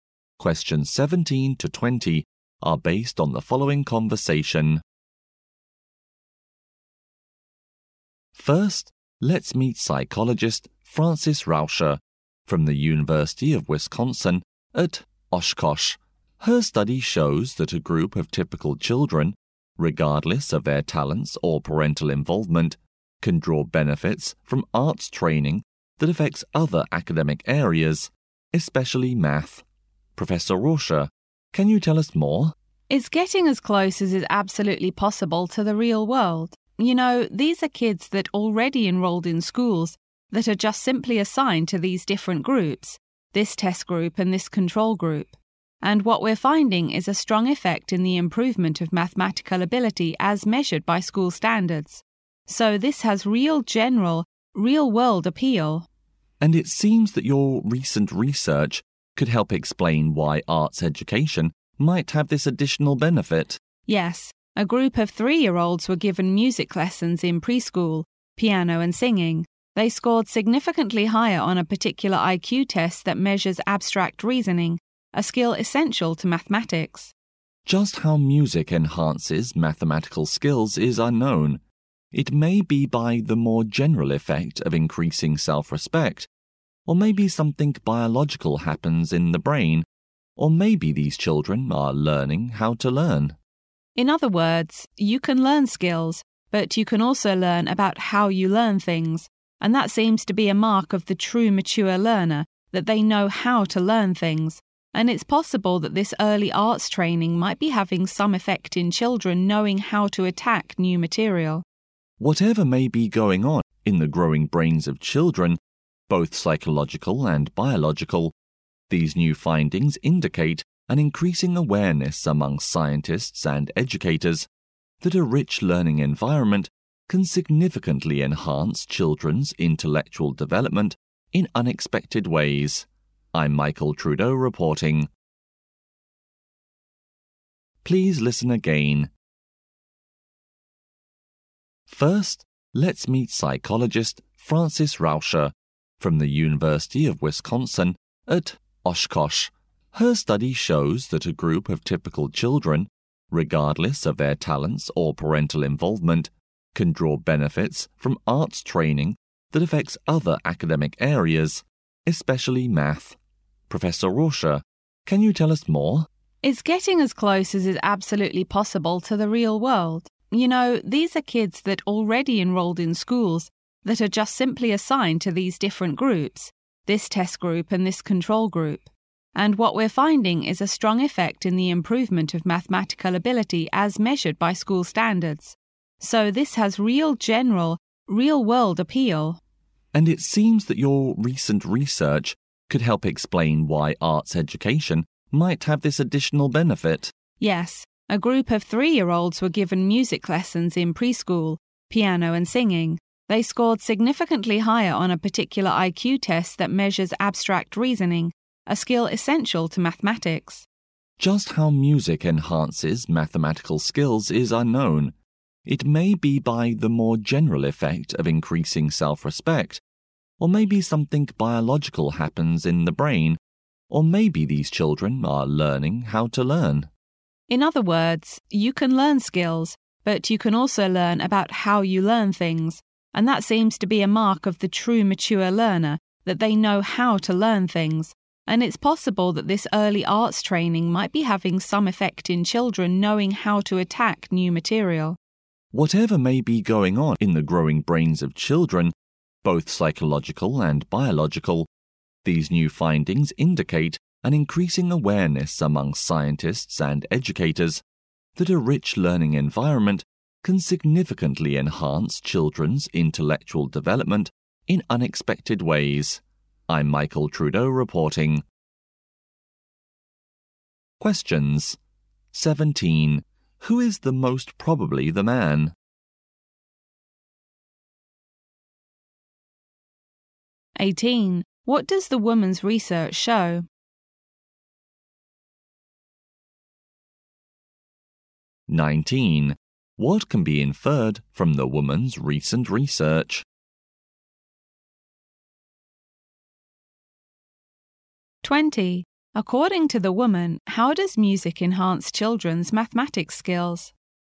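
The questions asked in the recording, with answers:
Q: Who is the most probably the man?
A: A reporter

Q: What does the woman's research show?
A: Arts training improves children's maths ability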